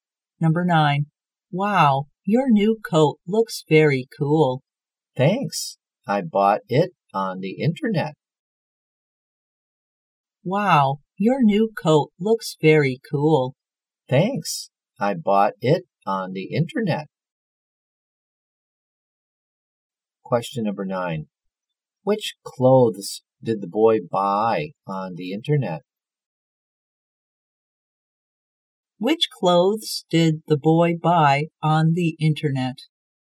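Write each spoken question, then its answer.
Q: Which clothes did the boy buy on the internet?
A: A coat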